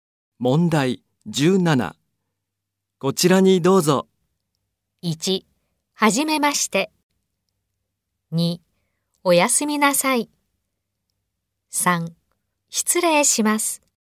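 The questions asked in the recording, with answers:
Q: こちらにどうぞ。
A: 3: 失礼します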